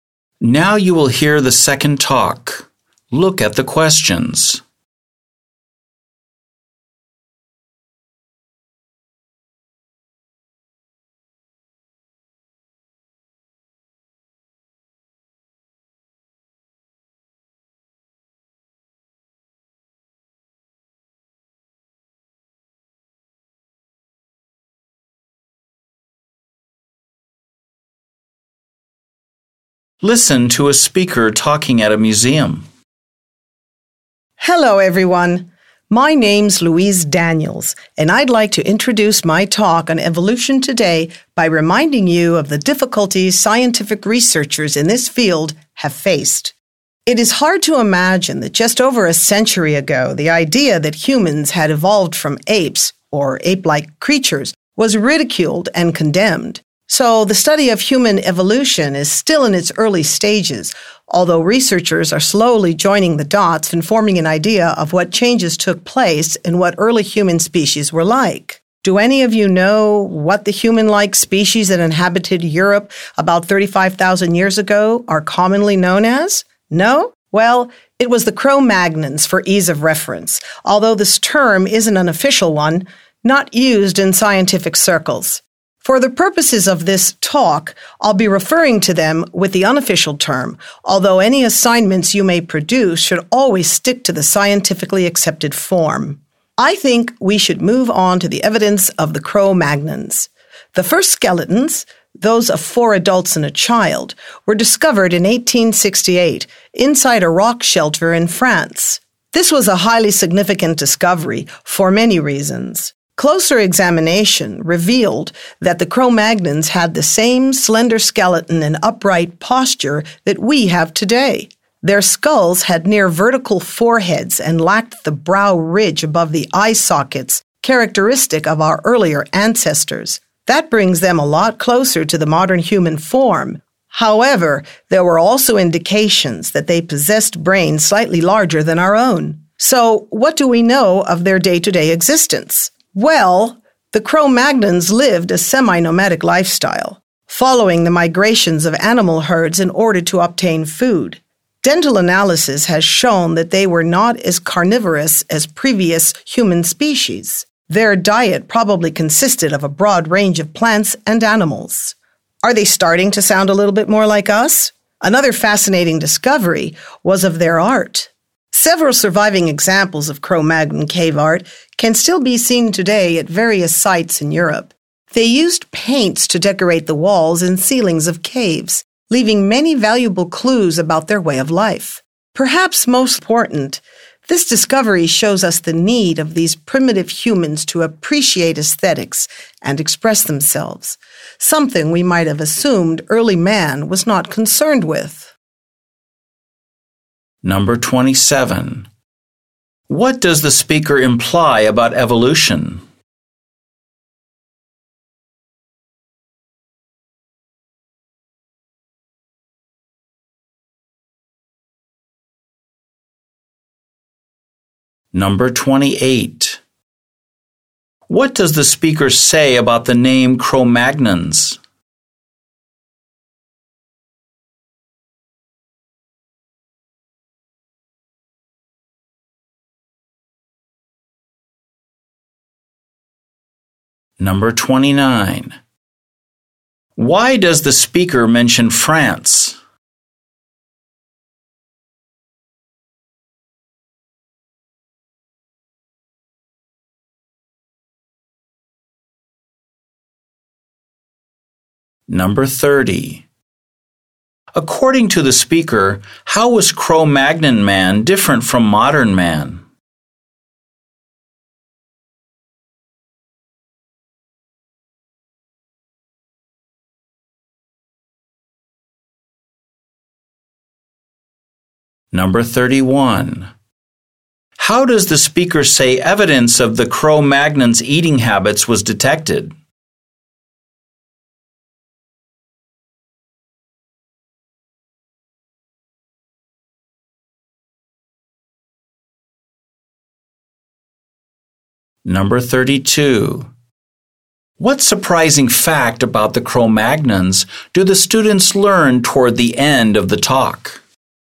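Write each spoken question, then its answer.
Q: What does the speaker say about the name Cro-Magnons?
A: It is not an official scientific term

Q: Why does the speaker mention France?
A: The first skeletons were discovered there in 1868

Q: According to the speaker, how was Cro-Magnon man different from modern man?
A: Its brain was slightly larger

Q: How does the speaker say evidence of the Cro-Magnon's eating habits was detected?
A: Through dental analysis

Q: What surprising fact about the Cro-Magnons do the students learn toward the end of the talk?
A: They appreciated aesthetics and expressed themselves through cave art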